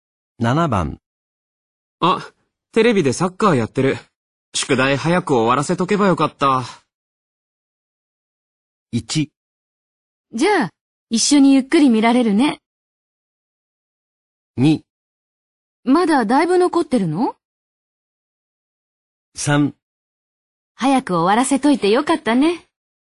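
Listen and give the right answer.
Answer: 2: まだだいぶ残ってるの?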